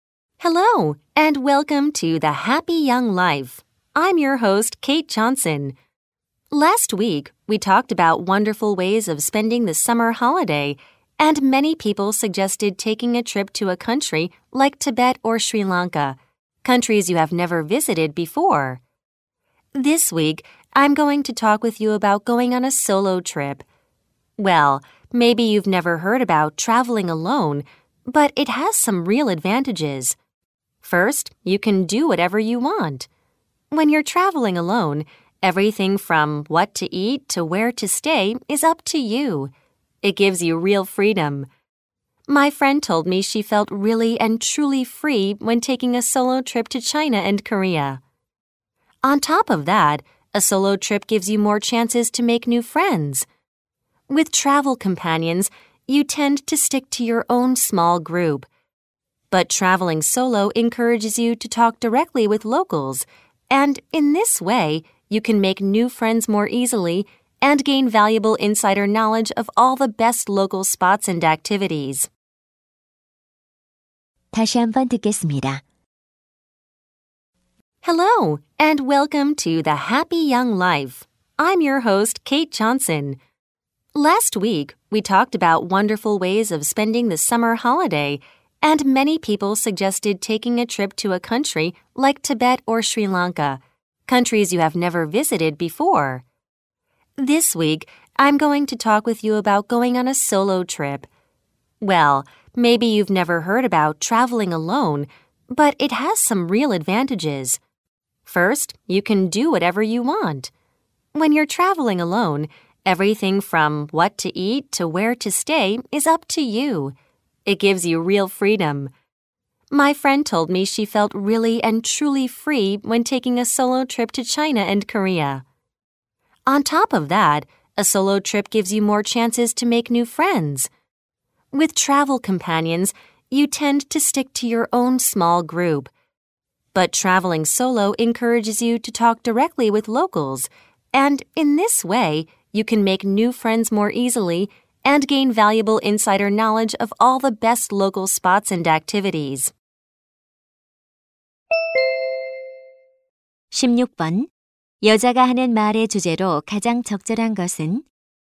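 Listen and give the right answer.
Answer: 혼자 여행하는 것의 장점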